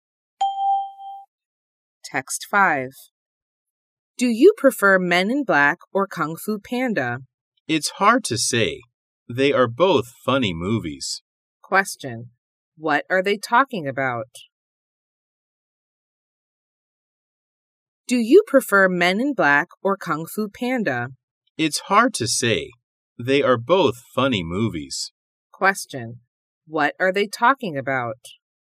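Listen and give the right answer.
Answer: Movies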